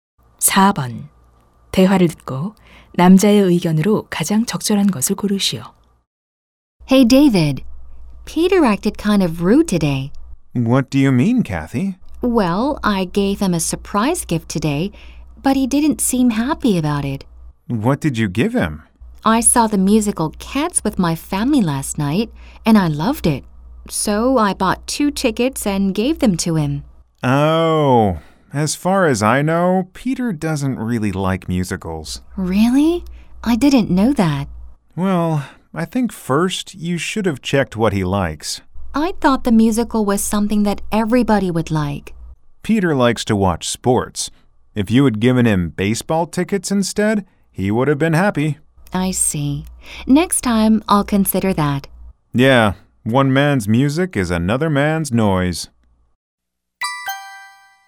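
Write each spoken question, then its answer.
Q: 대화를 듣고 남자의 의견으로 가장 적절한 것을 고르시오.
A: 선물하기 전에 상대방이 좋아하는 것을 먼저 확인해야 한다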